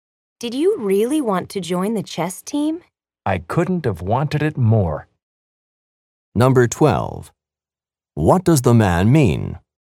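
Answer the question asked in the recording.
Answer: He wanted very much to join the chess team.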